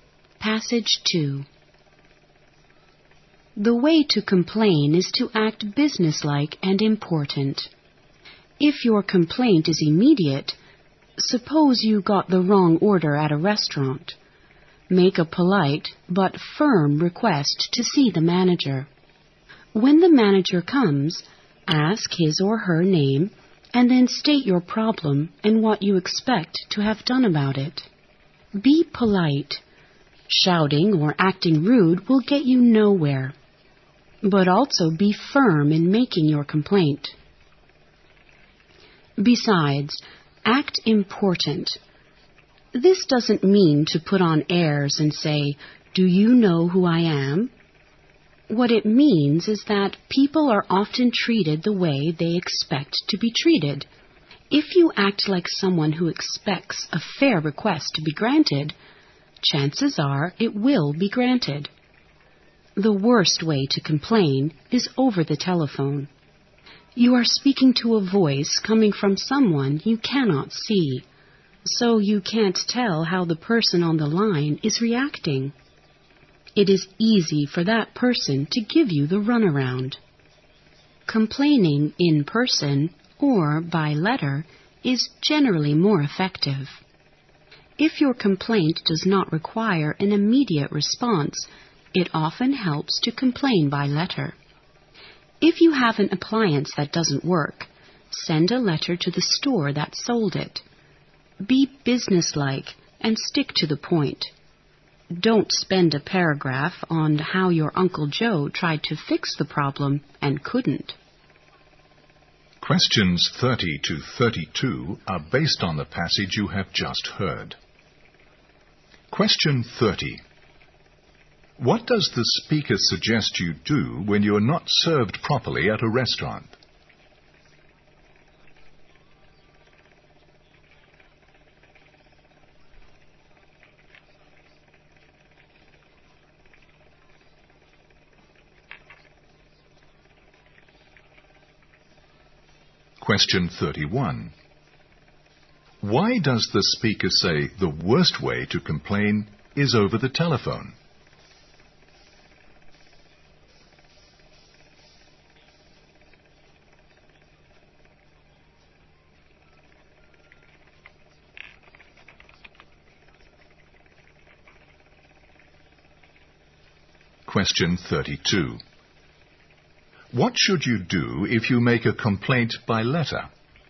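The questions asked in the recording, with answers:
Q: What does the speaker suggest you do when you're not served properly at a restaurant?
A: Politely but firmly ask to see the manager

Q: Why does the speaker say the worst way to complain is over the telephone?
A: You can't see how the person is reacting, so they can easily give you the runaround.

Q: What should you do if you make a complaint by letter?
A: Be businesslike and stick to the point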